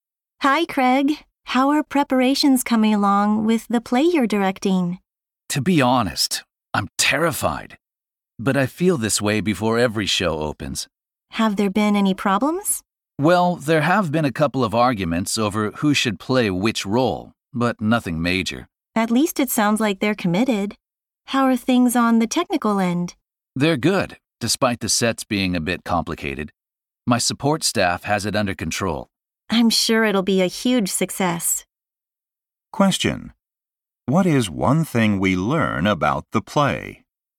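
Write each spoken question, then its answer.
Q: Question: What is one thing we learn about the play?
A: There have been some disagreements over casting, but nothing serious.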